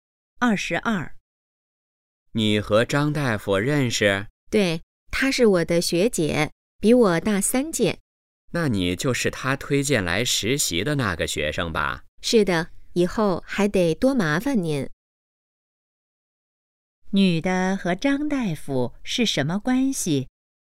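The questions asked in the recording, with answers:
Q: 女的和张大夫是什么关系?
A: 校友,张大夫是她学姐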